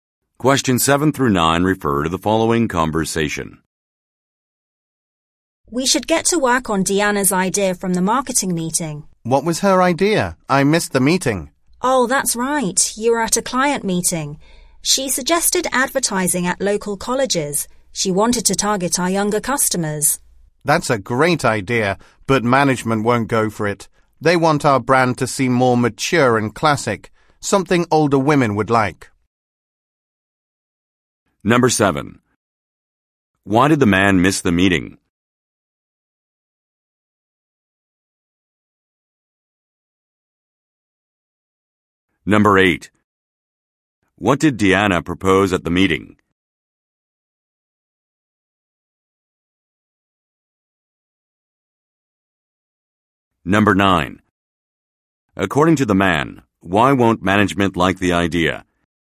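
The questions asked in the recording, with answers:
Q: Why did the man miss the meeting?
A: He was at a client meeting

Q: What did Deanna propose at the meeting?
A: Advertising at local colleges

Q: According to the man, why won't management like the idea?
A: They want the brand to seem more mature and classic, for older women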